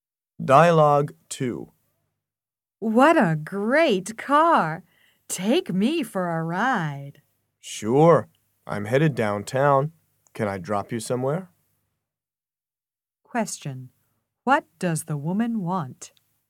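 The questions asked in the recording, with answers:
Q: What does the woman want?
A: A ride in the car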